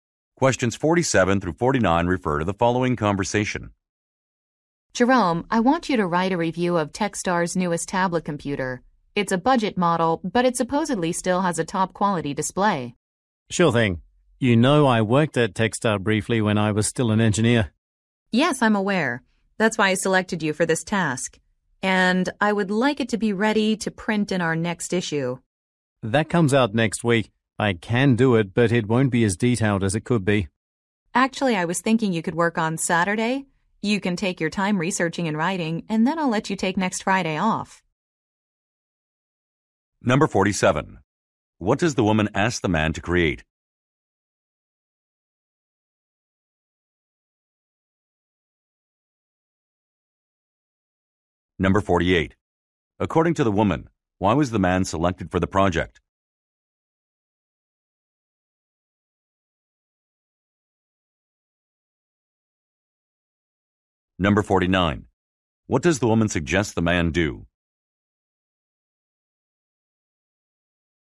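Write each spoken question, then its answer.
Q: What does the woman ask the man to create?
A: A review of a tablet computer.

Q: According to the woman, why was the man selected for the project?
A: He used to work at Techstar.

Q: What does the woman suggest the man do?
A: Work on Saturday.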